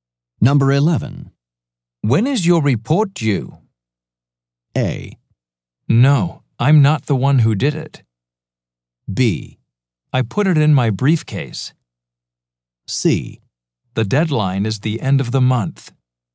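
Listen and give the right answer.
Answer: C: The deadline is the end of the month.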